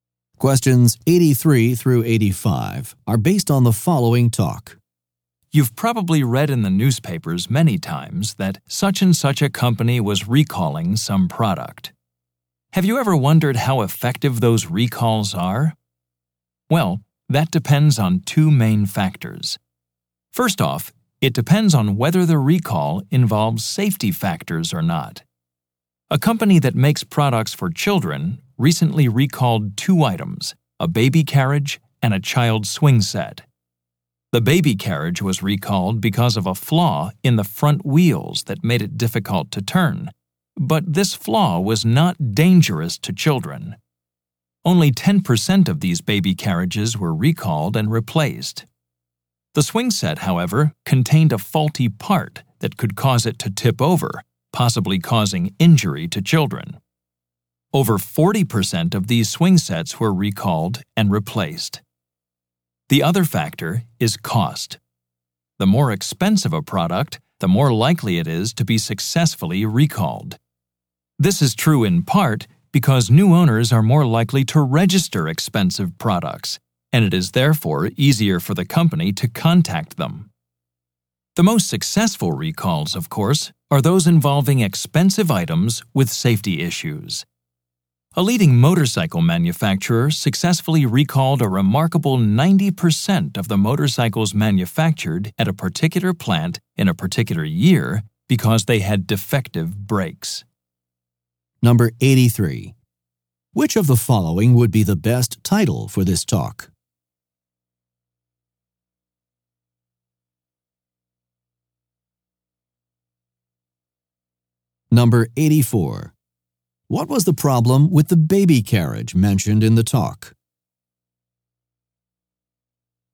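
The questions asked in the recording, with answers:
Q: What was the problem with the baby carriage mentioned in the talk?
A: A flaw in the front wheels made it hard to turn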